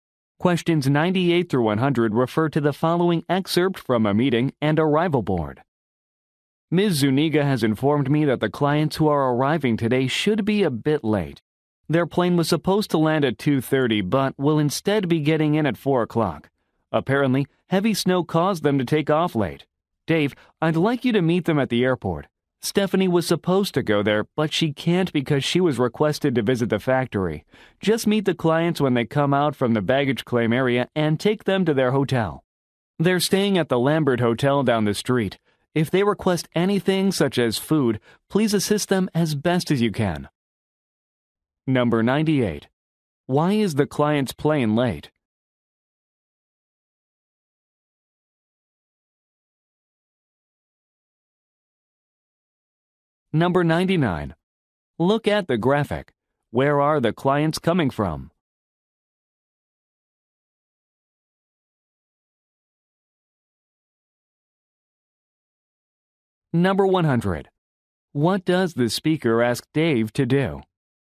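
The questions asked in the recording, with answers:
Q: Why is the client's plane late?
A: Heavy snow

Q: What does the speaker ask Dave to do?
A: Meet the clients at the airport and take them to their hotel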